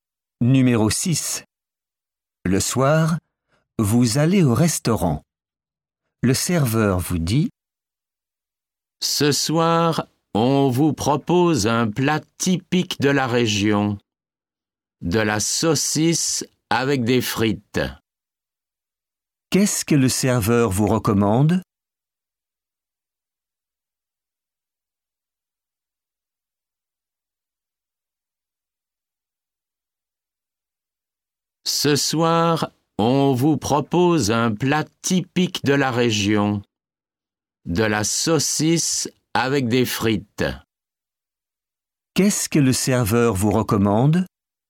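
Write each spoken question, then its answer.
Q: Qu'est-ce que le serveur vous recommande?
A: De la saucisse avec des frites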